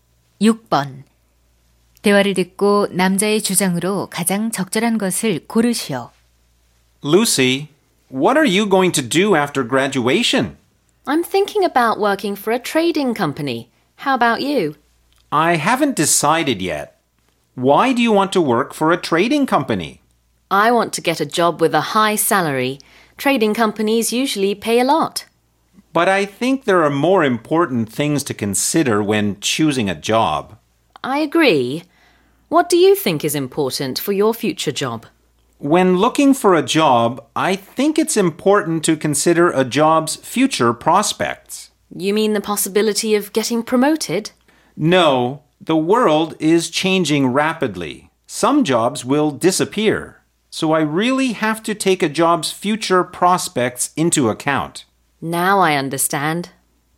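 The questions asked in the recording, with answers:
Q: 대화를 듣고 남자의 주장으로 가장 적절한 것을 고르시오.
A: 직업 선택 시 직업의 미래 전망을 고려해야 한다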